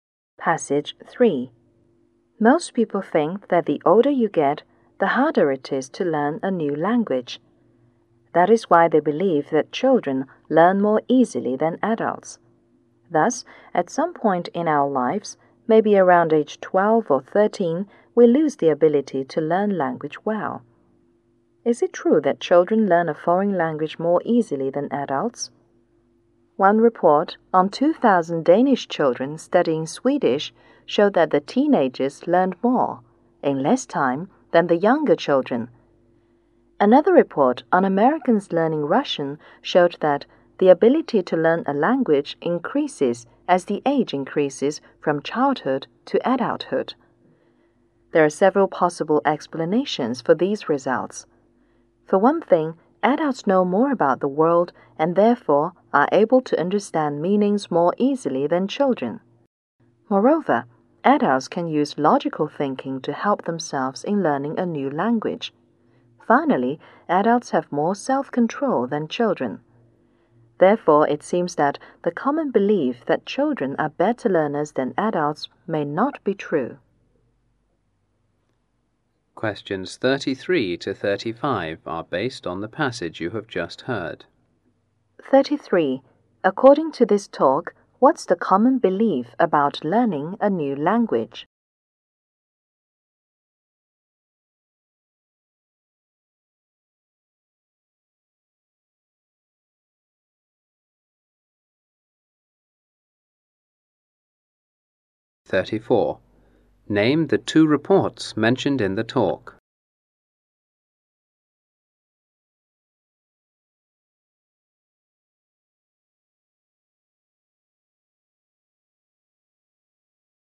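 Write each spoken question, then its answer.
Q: According to this talk, what's the common belief about learning a new language?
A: The older you get, the harder it is to learn; children learn more easily than adults

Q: Name the two reports mentioned in the talk.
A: A report on Danish children studying Swedish and a report on Americans learning Russian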